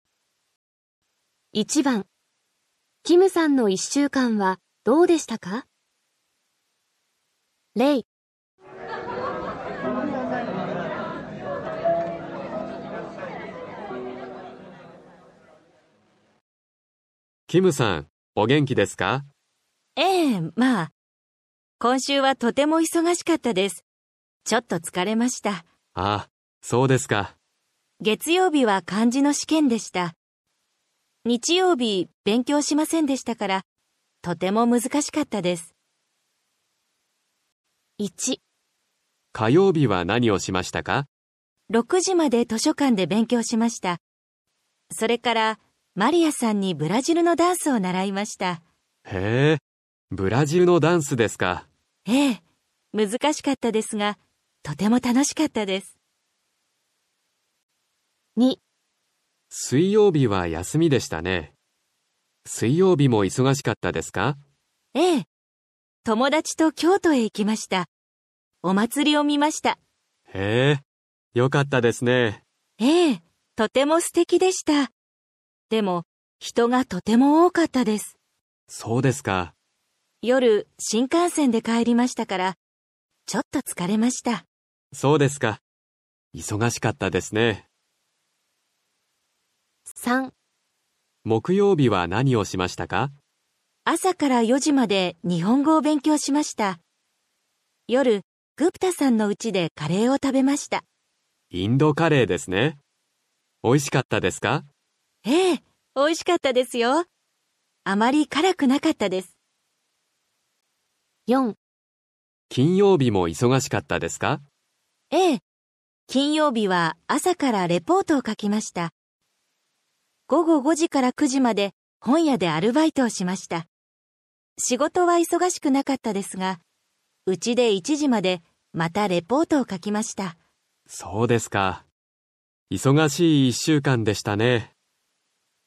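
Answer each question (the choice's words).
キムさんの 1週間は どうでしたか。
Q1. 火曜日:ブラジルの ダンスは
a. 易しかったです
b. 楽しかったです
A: 楽しかったです

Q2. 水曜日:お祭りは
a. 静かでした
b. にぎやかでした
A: にぎやかでした

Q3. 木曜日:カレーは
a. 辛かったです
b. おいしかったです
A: おいしかったです

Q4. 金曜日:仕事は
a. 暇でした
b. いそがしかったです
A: 暇でした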